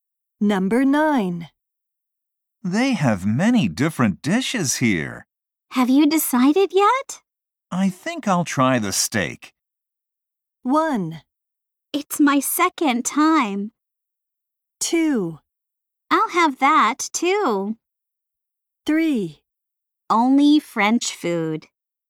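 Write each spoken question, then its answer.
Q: I think I'll try the steak.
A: 2: I'll have that, too.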